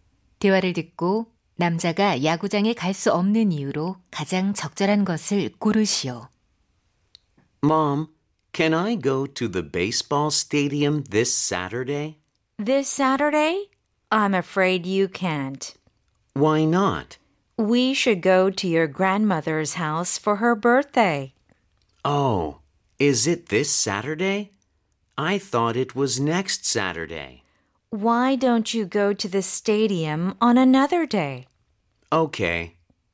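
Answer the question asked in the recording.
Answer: 할머니 생신으로 할머니 댁에 가야 해서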